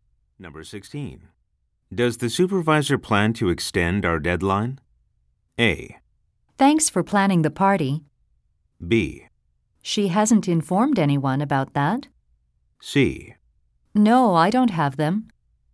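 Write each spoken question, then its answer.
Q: Does the supervisor plan to extend our deadline?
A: B: She hasn't informed anyone about that.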